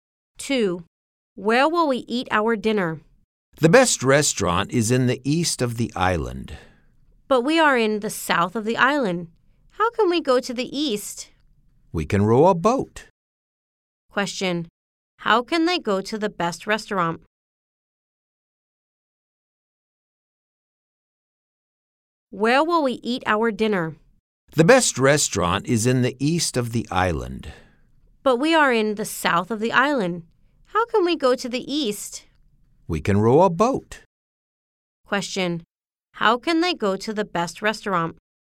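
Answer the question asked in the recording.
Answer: By rowing a boat.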